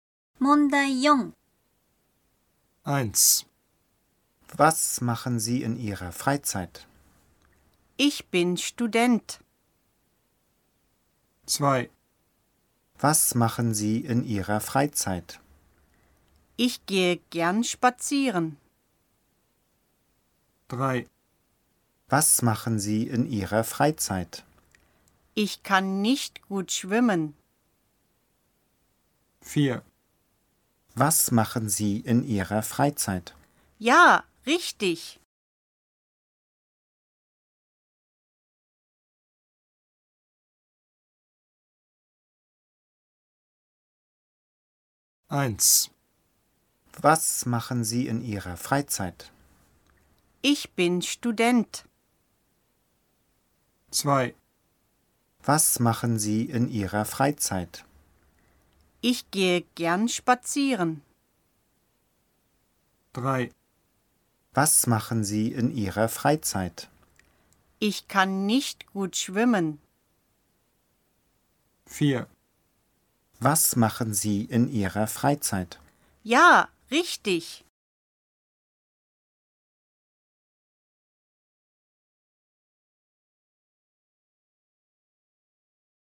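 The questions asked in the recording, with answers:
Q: Was machen Sie in Ihrer Freizeit?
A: 2: Ich gehe gern spazieren.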